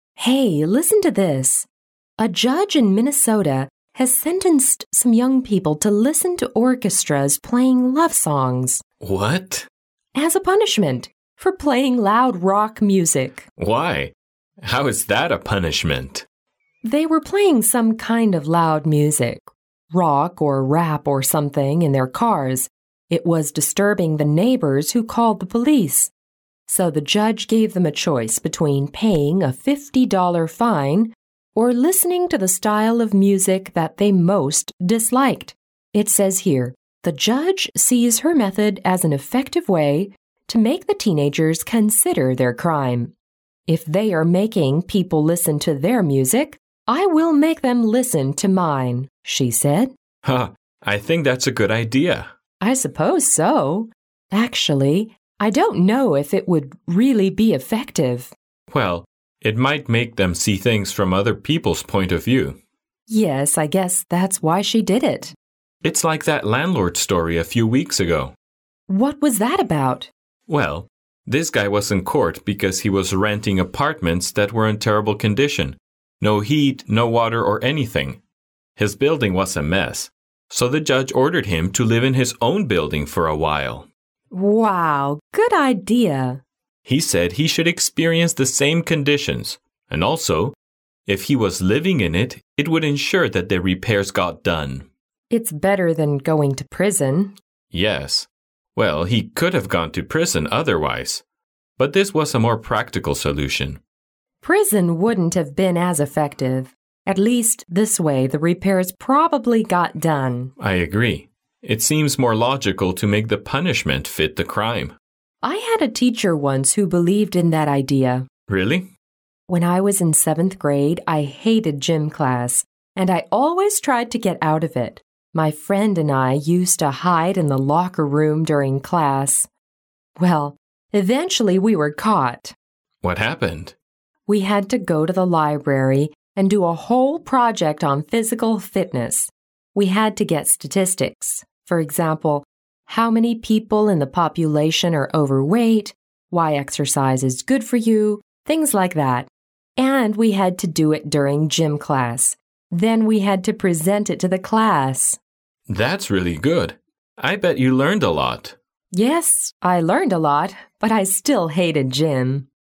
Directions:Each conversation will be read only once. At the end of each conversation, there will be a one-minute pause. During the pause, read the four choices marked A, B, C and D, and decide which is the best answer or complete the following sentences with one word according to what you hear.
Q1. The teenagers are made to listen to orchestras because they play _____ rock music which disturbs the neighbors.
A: loud

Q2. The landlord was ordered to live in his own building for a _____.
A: while

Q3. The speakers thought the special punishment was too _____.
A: logical

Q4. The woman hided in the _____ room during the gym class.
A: locker

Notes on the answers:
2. 对话中提到房东的故事,这位房东因为出租的房子没有暖气,没有供水,情况糟糕而被告上了法庭,"So the judge ordered him to live in his own building for a while",法官要求这位房东在自己这么糟的房里住上一段时间体验一番(而不是立即对房子进行改造),由此可知正确答案。
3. 两位说话者对这种特殊惩罚的态度,文中提到"Wow! Good idea!","It seems more logical to make the punishment fit the crime",可以看出两人认为特殊惩罚是一个好办法。由此可知正确答案。

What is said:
W: Hey, listen to this. "A judge in Minnesota has sentenced some young people to listen to orchestras playing love songs."
M: What?
W: As a punishment. For playing loud rock music.
M: Why? How is that a punishment?
W: They were playing some kind of loud music—rock, or rap or something—in their cars. It was disturbing the neighbors, who called the police. So the judge gave them a choice between paying a fifty-dollar fine or listening to the style of music that they most disliked. It says here, "The judge sees her method as an effective way to make the teenagers consider their crime. 'If they are making people listen to their music, I will make them listen to mine,' she said."
M: Hah! I think that's a good idea.
W: I suppose so. Actually... I don't know if it would really be effective.
M: Well, it might make them see things from other people's point of view.
W: Yes. I guess that's why she did it.
M: It's like that "landlord story" a few weeks ago.
W: What was that about?
M: Well, this guy was in court because he was renting apartments that were in terrible condition—no heat, no water, or anything. His building was a mess. So the judge ordered him to live in his own building for a while.
W: Wow! Good idea!
M: He said he should experience the same conditions. And also, if he was living in it, it would ensure that the repairs got done.
W: It's better than going to prison.
M: Yes. Well, he could have gone to prison, otherwise. But this was a more practical solution.
W: Prison wouldn't have been as effective. At least this way, the repairs probably got done.
M: I agree. It seems more logical to make the punishment fit the crime.
W: I had a teacher once who believed in that idea.
M: Really?
W: When I was in seventh grade, I hated gym class, and I always tried to get out of it. My friend and I used to hide in the locker room during class. Well, eventually we were caught.
M: What happened?
W: We had to go to the library and do a whole project on physical fitness. We had to get statistics. For example, how many people in the population are overweight, why exercise is good for you.., things like that. And we had to do it during gym class. Then we had to present it to the class.
M: That's really good. I bet you learned a lot.
W: Yes, I learned a lot, but I still hated gym?